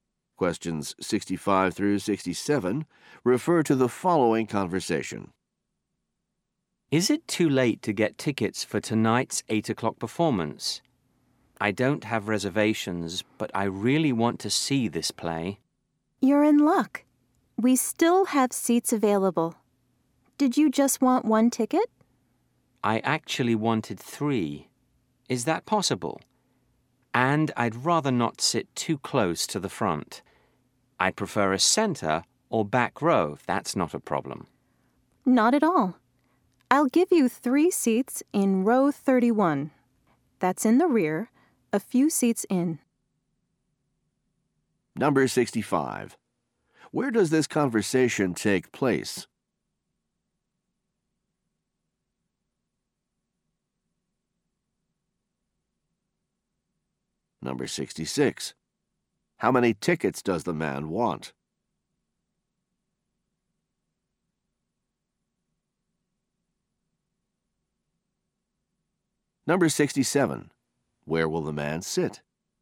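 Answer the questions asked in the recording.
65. At a theater ticket office
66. Three
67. In row 31, near the back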